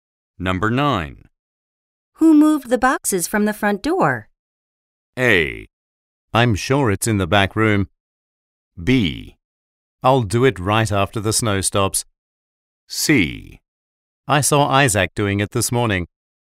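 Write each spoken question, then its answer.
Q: Who moved the boxes from the front door?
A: C: I saw Isaac doing it this morning.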